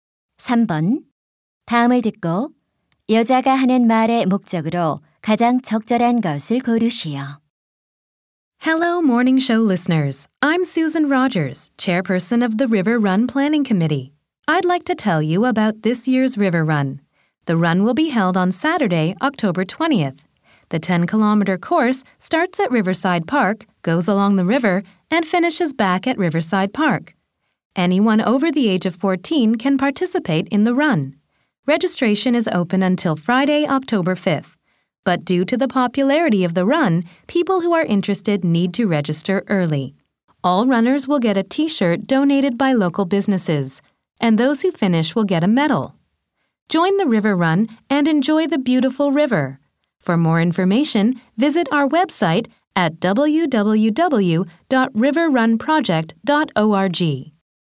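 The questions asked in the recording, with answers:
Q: 다음을 듣고 여자가 하는 말의 목적으로 가장 적절한 것을 고르시오.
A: River Run 행사(달리기 대회)를 안내하고 참가를 독려하려고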